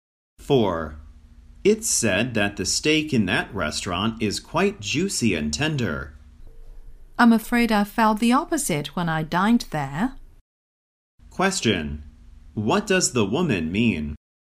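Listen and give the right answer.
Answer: She didn't think the steak was juicy or tender.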